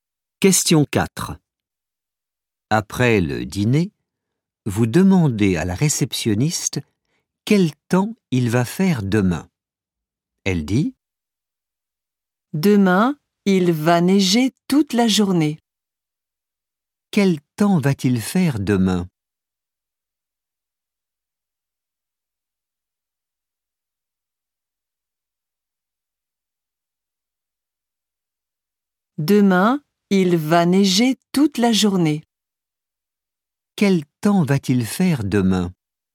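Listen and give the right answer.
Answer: Il va neiger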